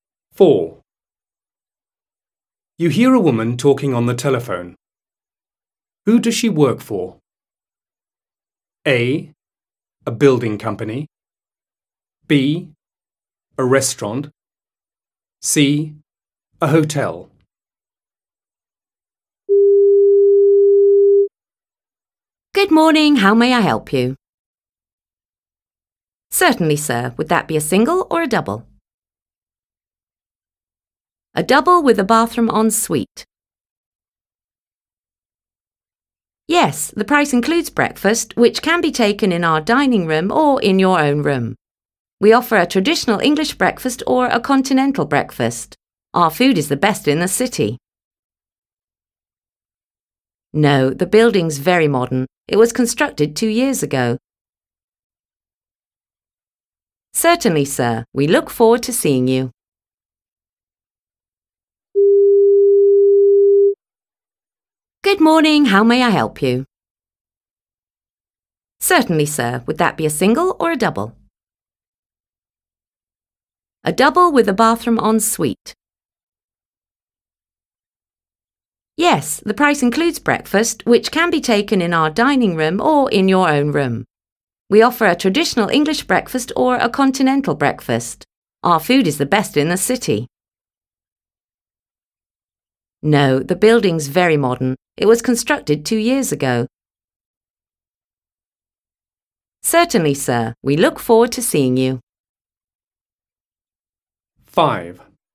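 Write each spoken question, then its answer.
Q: Who does she work for?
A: C: A hotel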